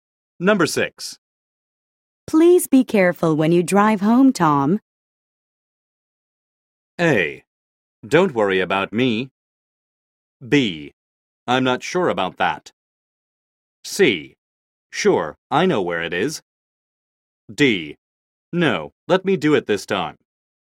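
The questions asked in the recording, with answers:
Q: Please be careful when you drive home, Tom.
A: A: Don't worry about me.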